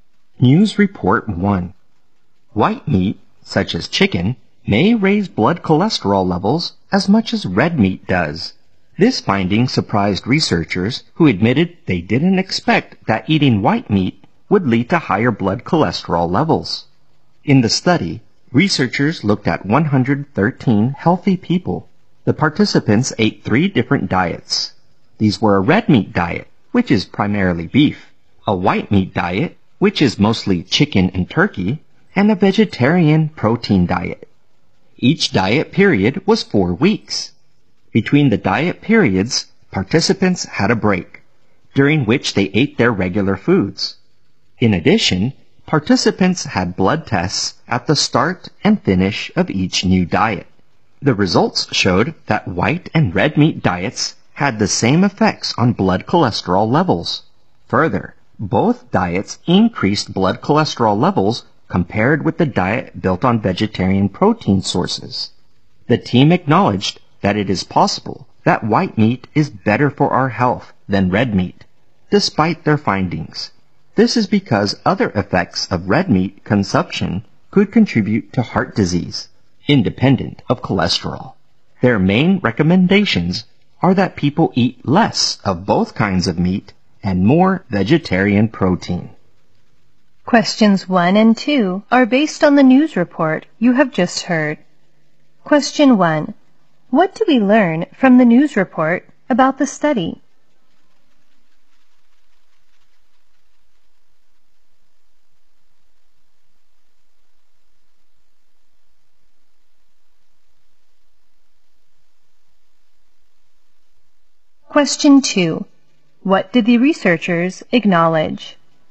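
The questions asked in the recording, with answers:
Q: What do we learn from the news report about the study?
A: White and red meat diets had the same effects on blood cholesterol levels

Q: What did the researchers acknowledge?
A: White meat may still be better for health than red meat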